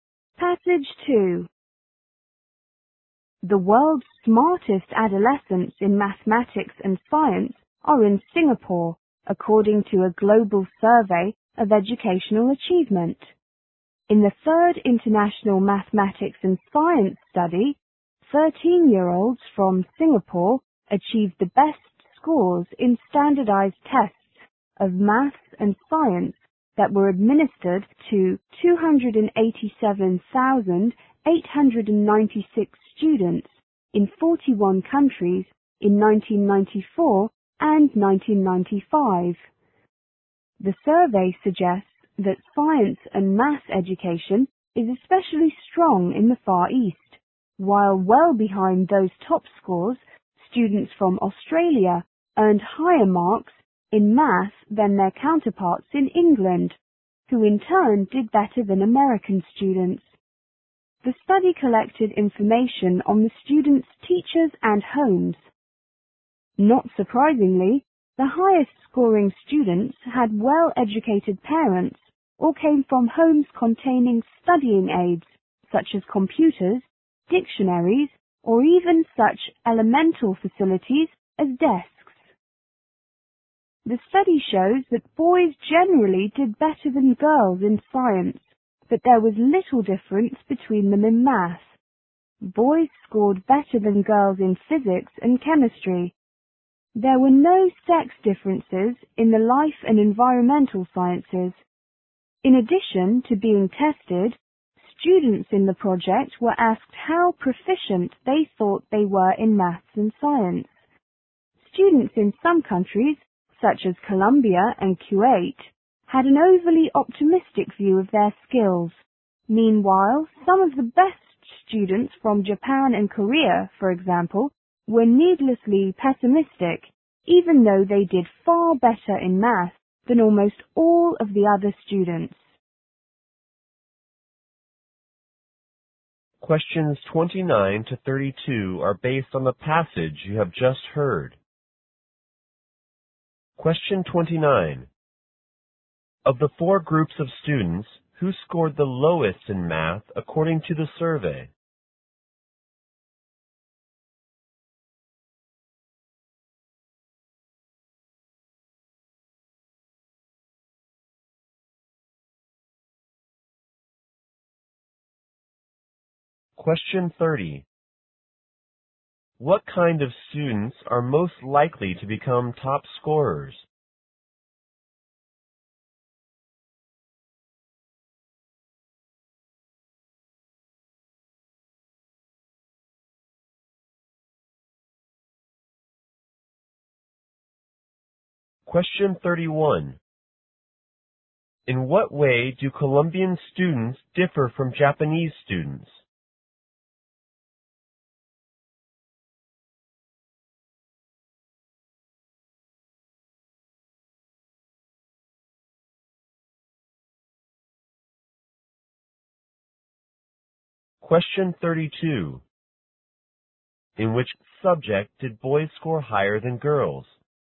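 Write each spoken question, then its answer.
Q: What kind of students are most likely to become top scorers?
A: Those with well-educated parents or homes with study aids.

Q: In what way do Colombian students differ from Japanese students?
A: Colombians were overly optimistic about their skills; Japanese were pessimistic.

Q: In which subject did boys score higher than girls?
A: Physics and chemistry.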